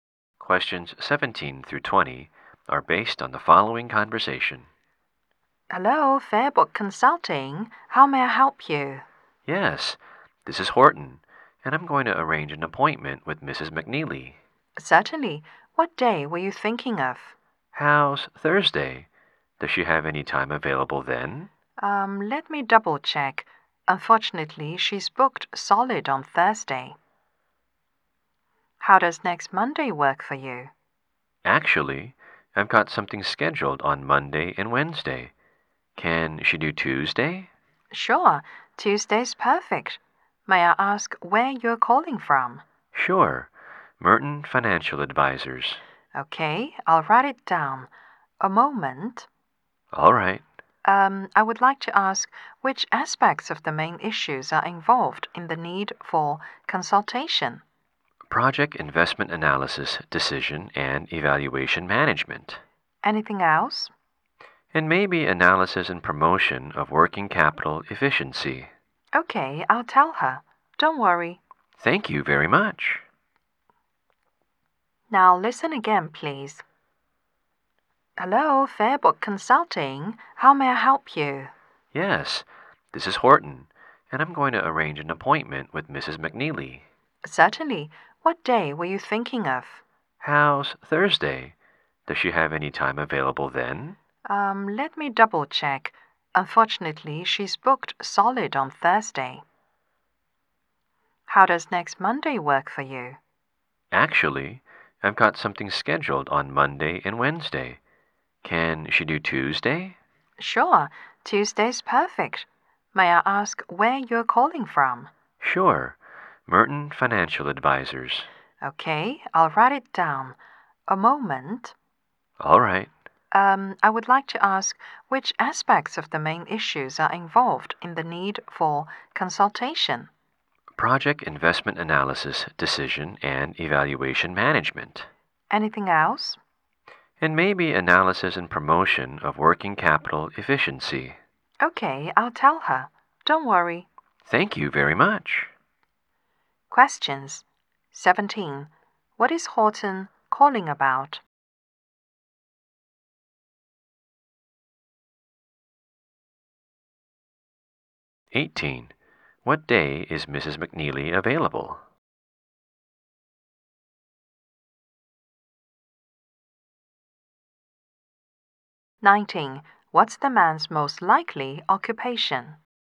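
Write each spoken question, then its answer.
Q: What is Horton calling about?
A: To arrange an appointment with Mrs. McNeely.

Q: What day is Mrs. McNeely available?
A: Tuesday.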